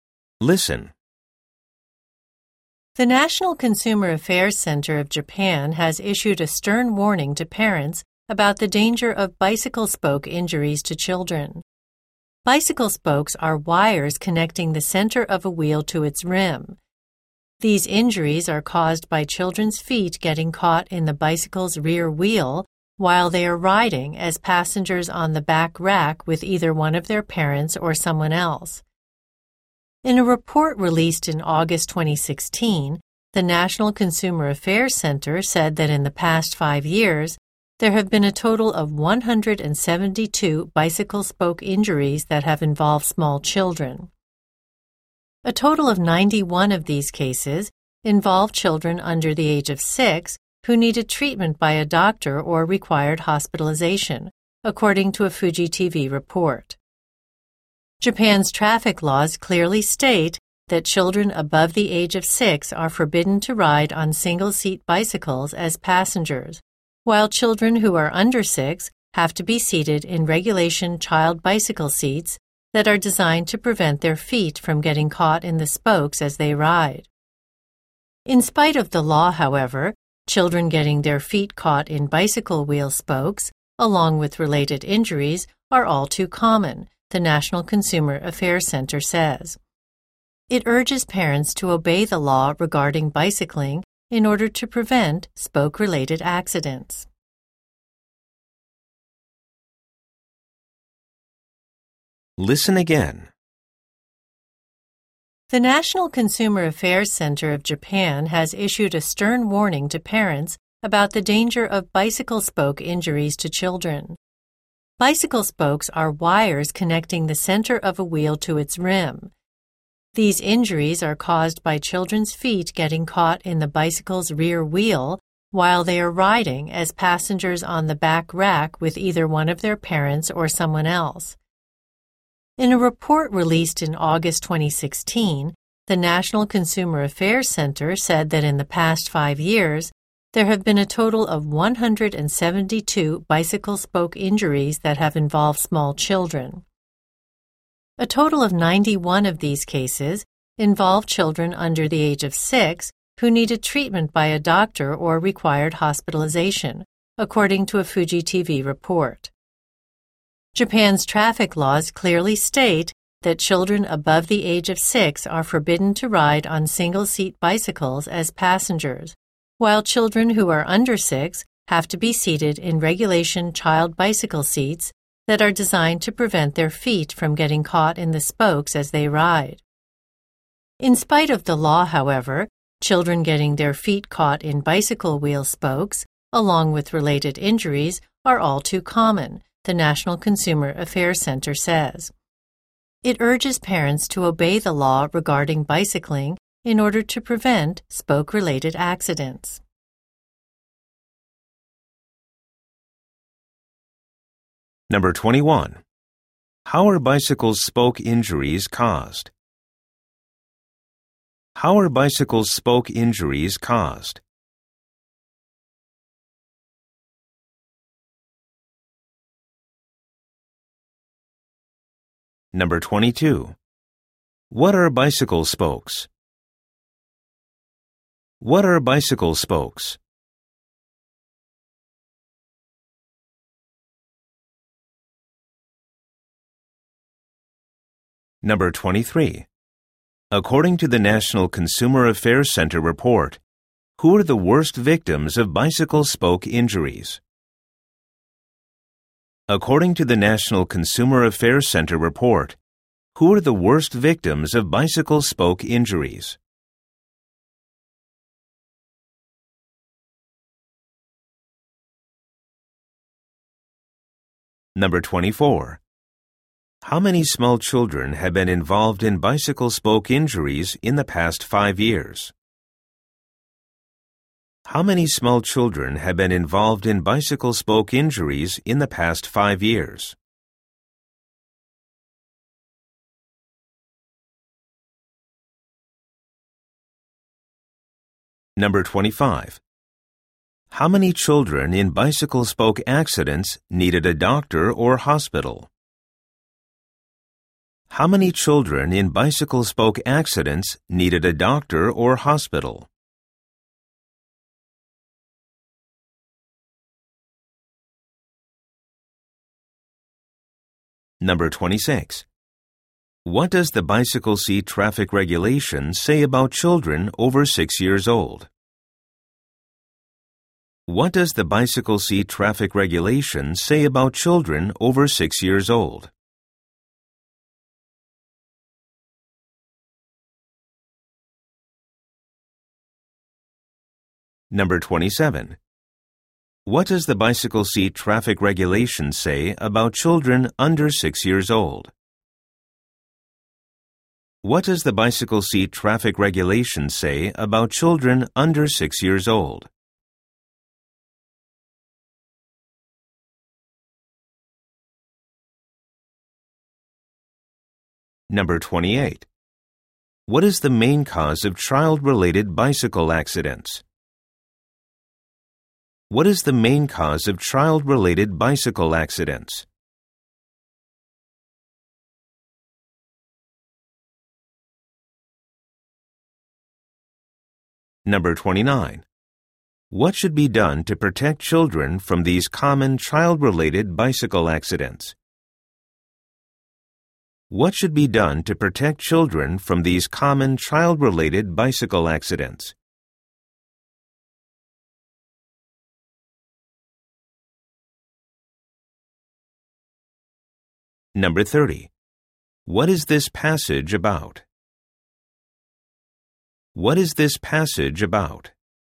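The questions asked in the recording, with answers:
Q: How are bicycle spoke injuries caused?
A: Children's feet get caught in the rear wheel while they ride as passengers on the back rack

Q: What are bicycle spokes?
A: Wires connecting the center of a wheel to its rim

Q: How many small children have been involved in bicycle spoke injuries in the past 5 years?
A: 172

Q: How many children in bicycle spoke accidents needed a doctor or hospital?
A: 91

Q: What does the bicycle seat traffic regulation say about children over 6 years old?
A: They are forbidden to ride on single-seat bicycles as passengers

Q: What does the bicycle seat traffic regulation say about children under 6 years old?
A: They must sit in regulation child bicycle seats

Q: What is the main cause of child-related bicycle accidents?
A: Children's feet getting caught in the wheel spokes

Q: What should be done to protect children from these common child-related bicycle accidents?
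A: Parents should obey the bicycling law

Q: What is this passage about?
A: A warning about bicycle spoke injuries to children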